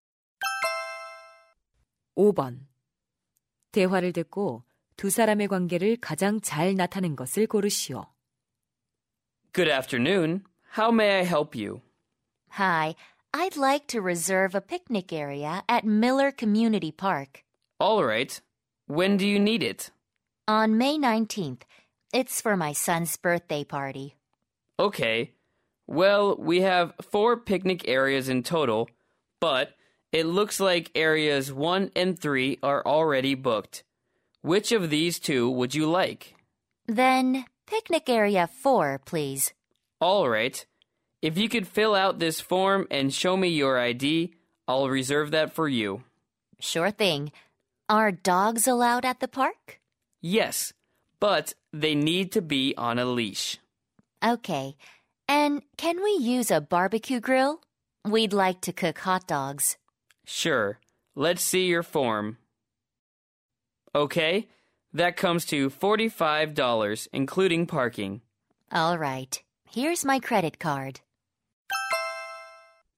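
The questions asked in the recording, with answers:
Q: 대화를 듣고 두 사람의 관계를 가장 잘 나타낸 것을 고르시오.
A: 공원 예약 담당 직원 - 이용객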